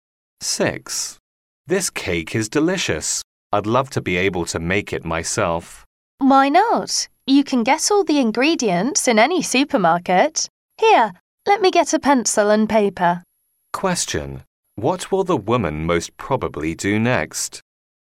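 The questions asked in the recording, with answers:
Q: What will the woman most probably do next?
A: Write down the recipe.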